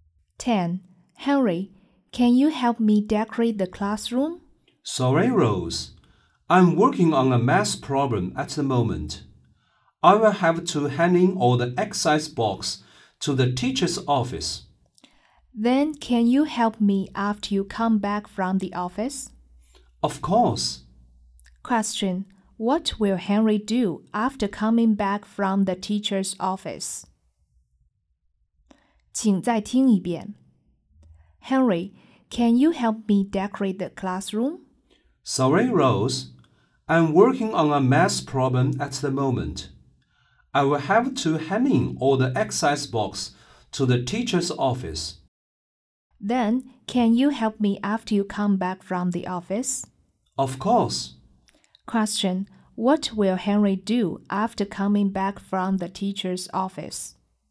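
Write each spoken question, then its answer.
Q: Question: What will Henry do after coming back from the teacher's office?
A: Help Rose decorate the classroom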